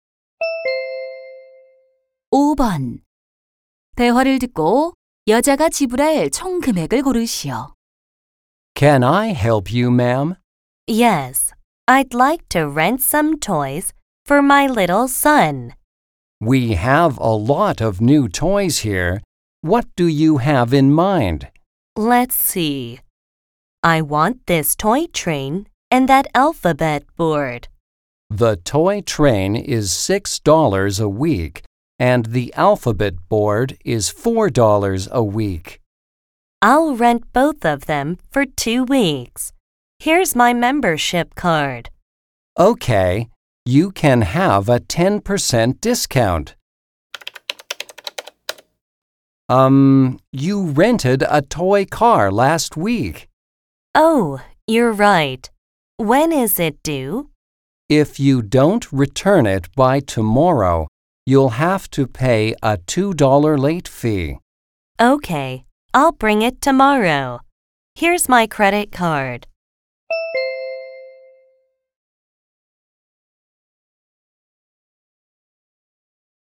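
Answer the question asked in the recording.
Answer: 18달러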